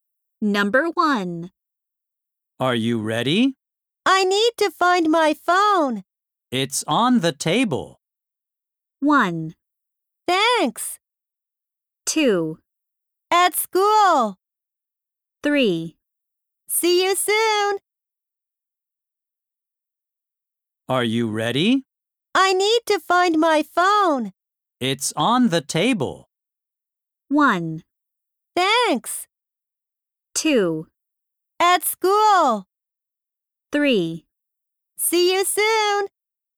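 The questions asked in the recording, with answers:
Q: It's on the table.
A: 1: Thanks.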